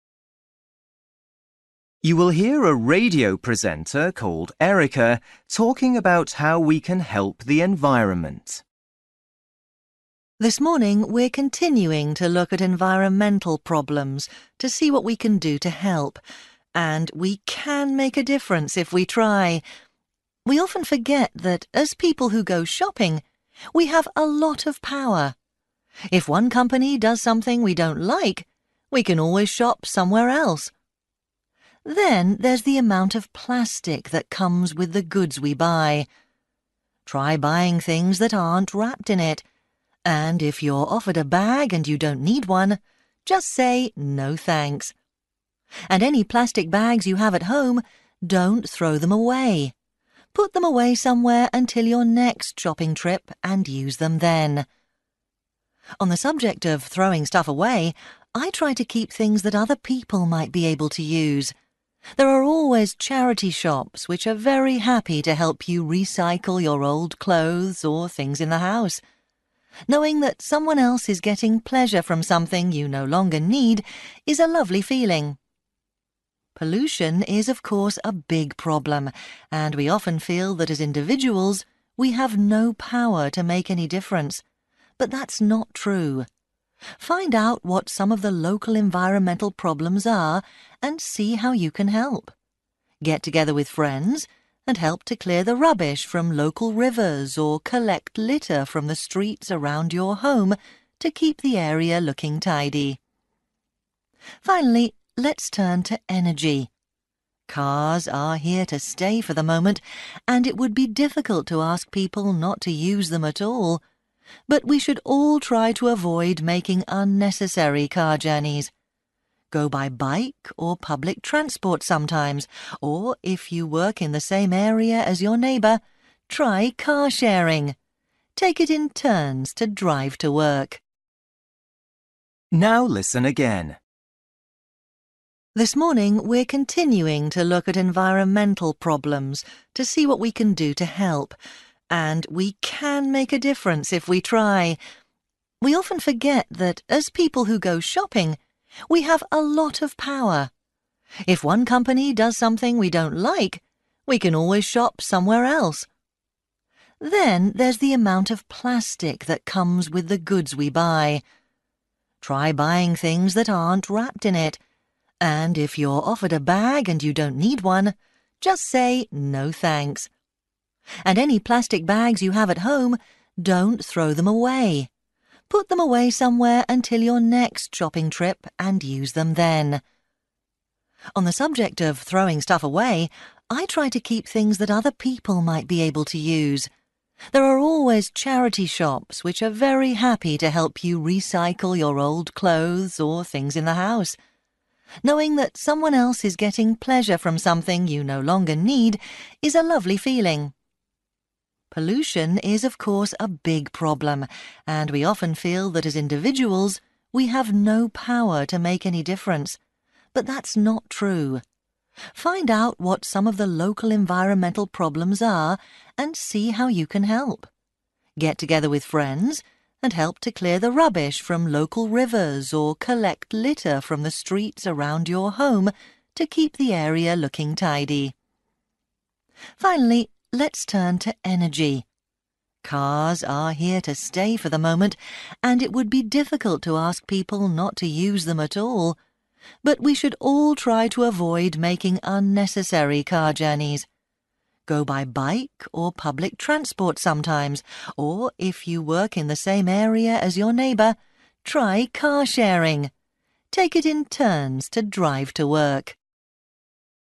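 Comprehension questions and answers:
For each question, write the correct answer in the gap. Write one or two words or a number or a date or a time. You will hear a radio presenter called Erica talking about how we can help the environment.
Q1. Remember that when we're (1) . we always have the choice to buy something somewhere else.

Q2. Take (2) with you the next time you go shopping.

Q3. Recycle unwanted things by giving them to (3)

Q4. See how you might be able to help with (4) problems where you live.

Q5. Ask your friends to help you clear rubbish and litter from (5) and streets in your area.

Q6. Try car-sharing with your (6) if you work in the same area.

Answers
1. shopping
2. plastic bags
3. charity shops
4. local environmental
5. rivers
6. neighbour

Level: Luyện nghe trình độ B1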